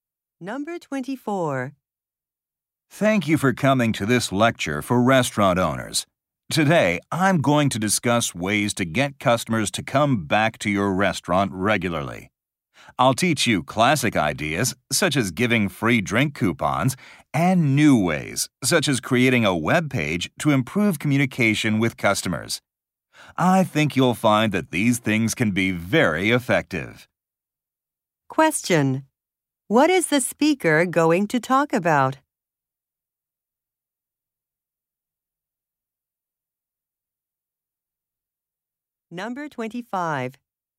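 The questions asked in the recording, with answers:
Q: What is the speaker going to talk about?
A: Ways to get customers to come back regularly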